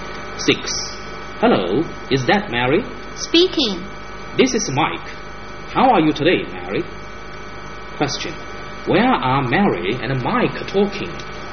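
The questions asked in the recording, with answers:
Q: Where are Mary and Mike talking?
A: On the telephone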